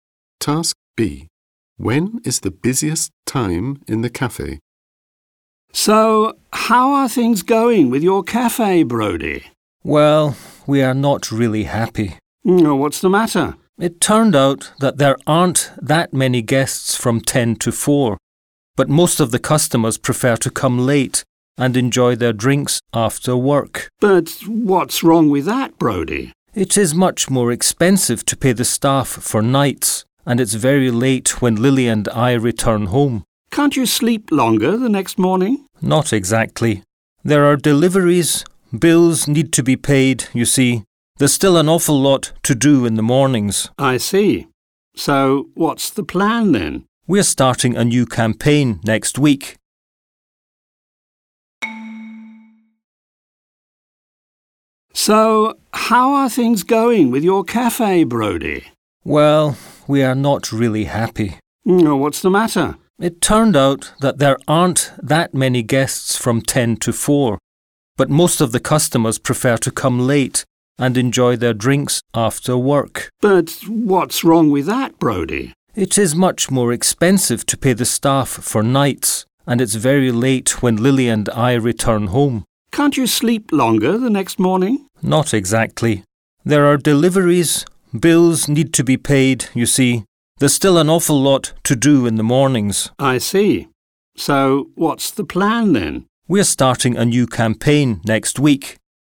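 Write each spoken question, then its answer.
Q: When is the busiest time in the cafe?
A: Late, in the evening after work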